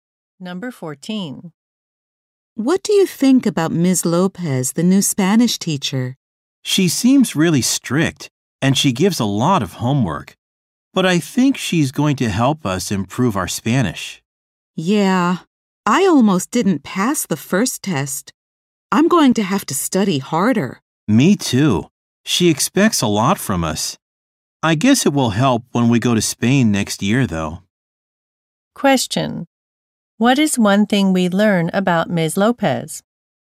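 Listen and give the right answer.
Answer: She is strict and gives a lot of homework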